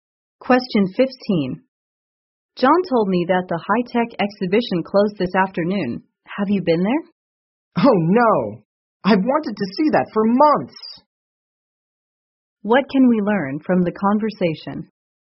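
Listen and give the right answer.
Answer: The man has missed the exhibition he wanted to see for months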